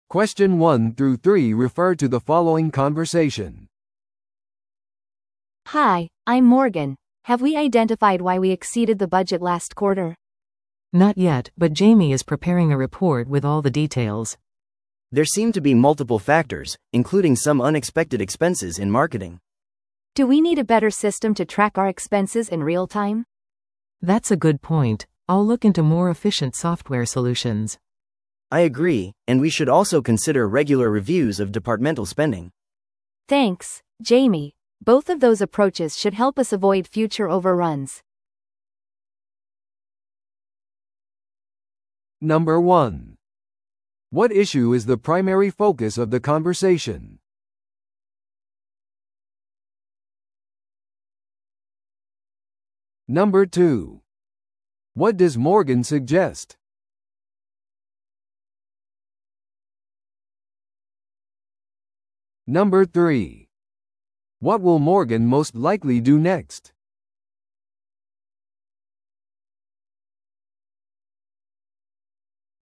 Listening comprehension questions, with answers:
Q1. What issue is the primary focus of the conversation?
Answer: 先月の予算超過の見直し。

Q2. What does Morgan suggest?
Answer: リアルタイムの経費追跡システムを導入する。

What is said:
A: Hi, I'm Morgan. Have we identified why we exceeded the budget last quarter?
B: Not yet, but Jamie is preparing a report with all the details.
C: There seem to be multiple factors, including some unexpected expenses in marketing.
A: Do we need a better system to track our expenses in real-time?
B: That's a good point. I'll look into more efficient software solutions.
C: I agree, and we should also consider regular reviews of departmental spending.
A: Thanks, Jamie. Both of those approaches should help us avoid future overruns.